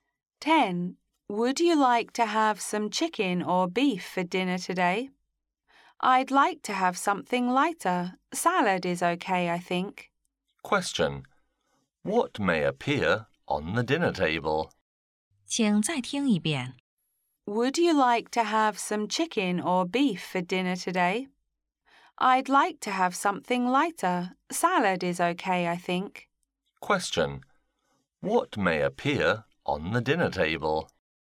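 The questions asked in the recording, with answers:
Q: What may appear on the dinner table?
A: Salad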